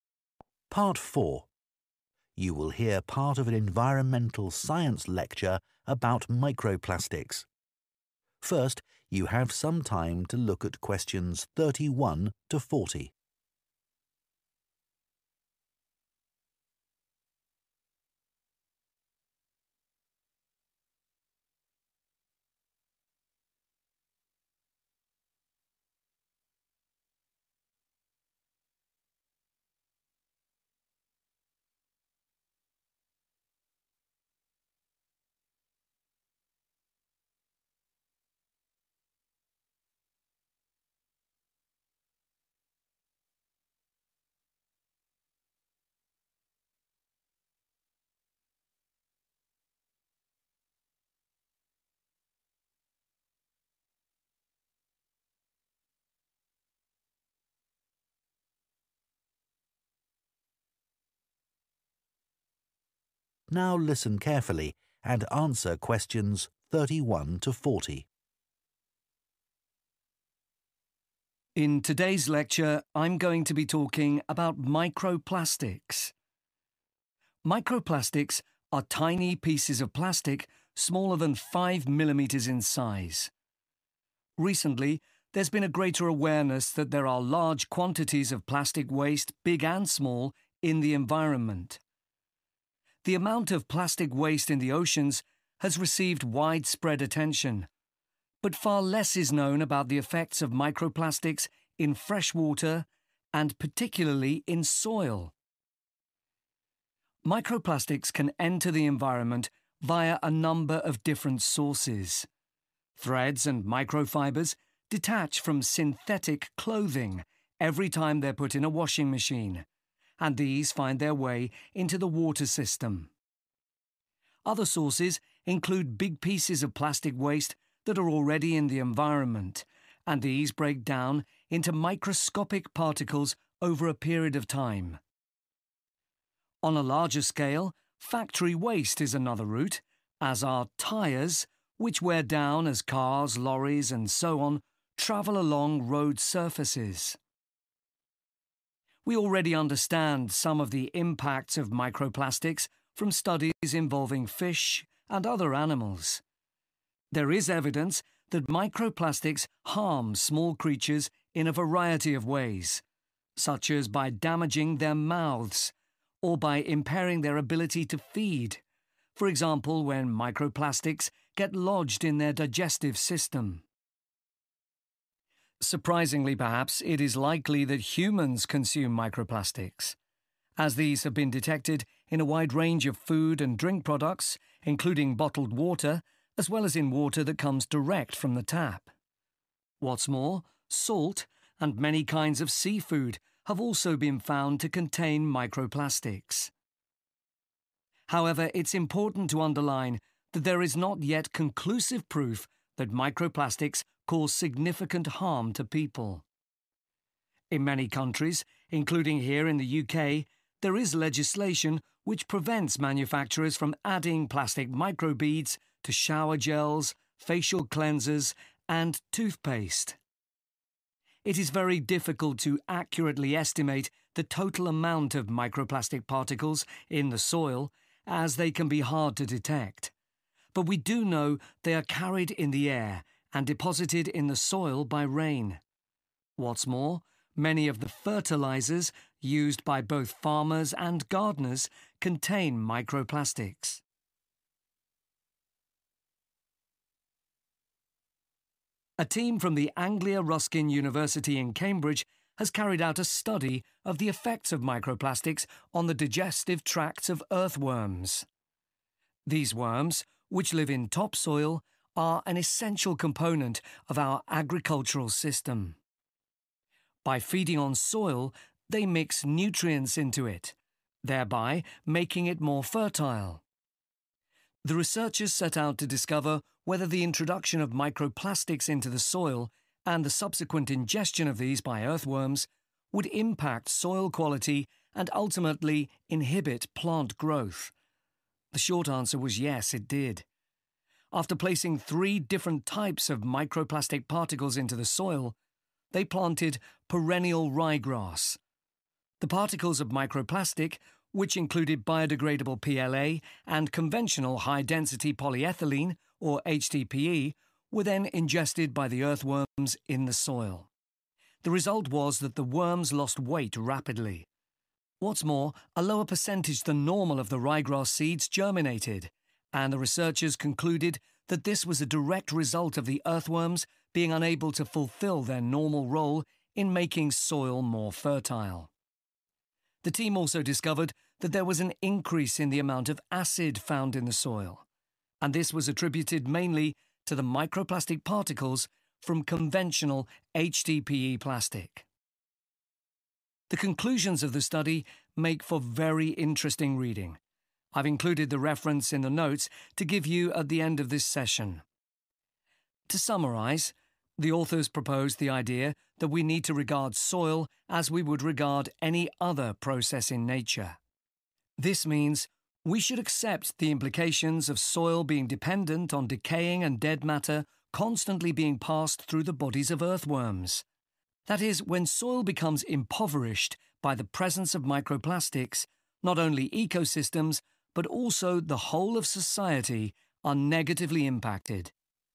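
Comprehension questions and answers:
Complete the notes below.Write ONE WORD ONLY for each answer.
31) Fibres from some 31 during washing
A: clothing

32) They cause injuries to the 32 of wildlife and effect their digestive systems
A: mouths

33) They enter the food chain, e.g., in bottled and tap water, 33 and seafood.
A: salt

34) They may not affect human health, but they are already banned in skin cleaning products and 34 in some countries.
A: toothpaste

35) Microplastic enter the soil through the air, rain, and 35.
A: fertilizers

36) Earthworms are important because they add 36 to the soil.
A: nutrients

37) The study aimed to find whether microplastics in earthworms affect the 37. of plants.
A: growth

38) 38 loss in earthworms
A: weight

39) a rise in the level of 39 in the soil.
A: acid

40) change to soil damage both ecosystems and 40.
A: society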